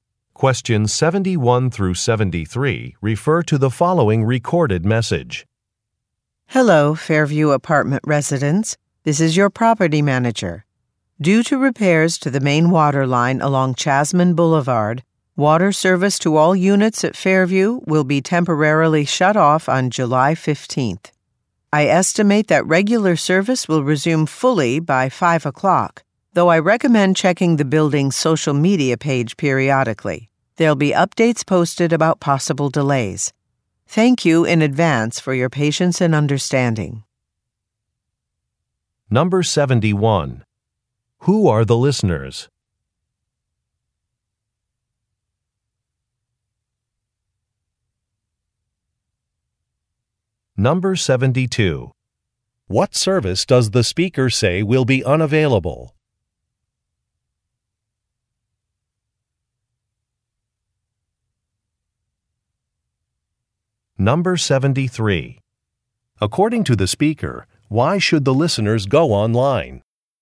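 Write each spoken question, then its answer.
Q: Who are the listeners?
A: Apartment residents

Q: What service does the speaker say will be unavailable?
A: Water service

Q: According to the speaker, why should the listeners go online?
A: To check for updates about possible delays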